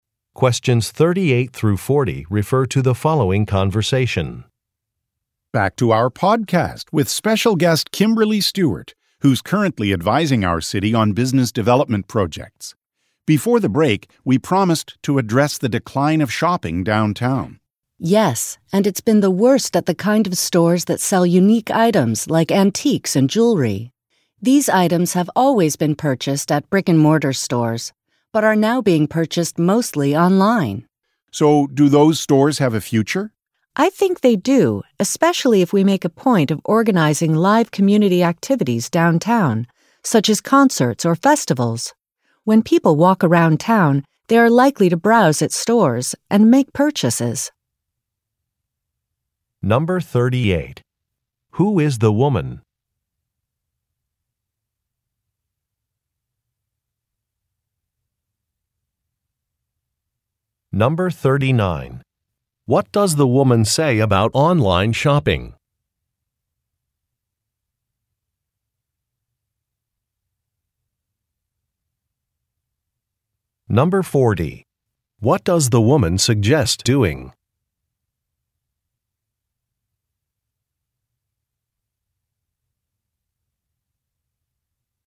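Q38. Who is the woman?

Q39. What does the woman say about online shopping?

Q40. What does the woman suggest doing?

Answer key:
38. A business development advisor to the city
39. Unique items like antiques and jewelry are now mostly bought online
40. Organizing live community activities downtown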